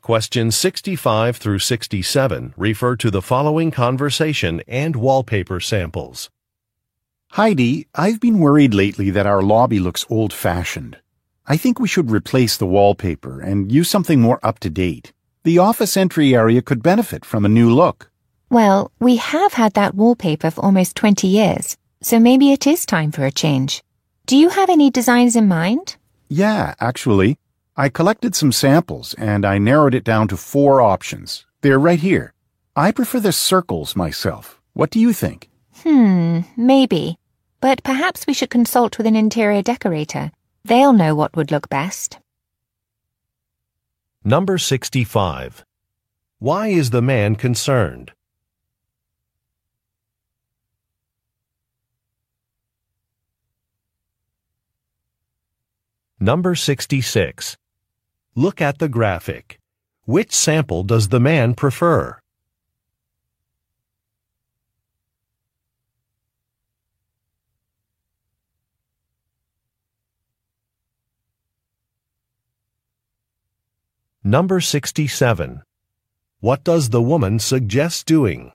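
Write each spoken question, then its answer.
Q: Why is the man concerned?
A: The lobby looks old-fashioned.

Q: What does the woman suggest doing?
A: Consulting with an interior decorator.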